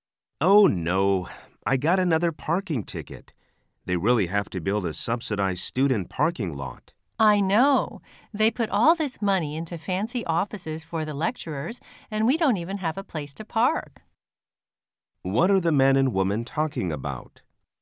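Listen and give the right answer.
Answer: Parking on campus / the lack of student parking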